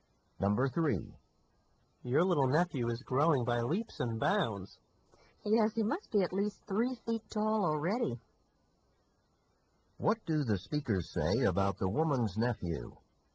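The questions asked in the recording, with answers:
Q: What do the speakers say about the woman's nephew?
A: He is growing very fast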